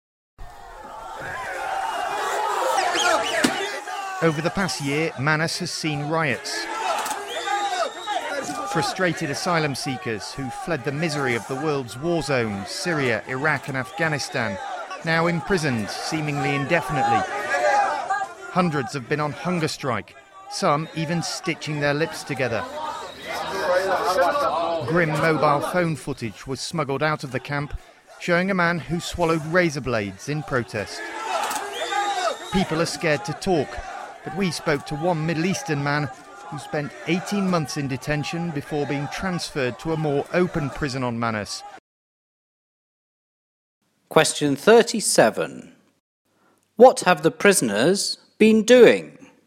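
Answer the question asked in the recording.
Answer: Rioting, hunger strikes, stitching their lips together and swallowing razor blades in protest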